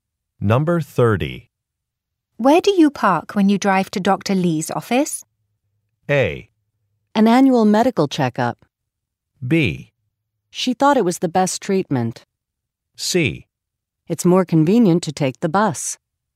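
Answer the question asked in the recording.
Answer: C: It's more convenient to take the bus.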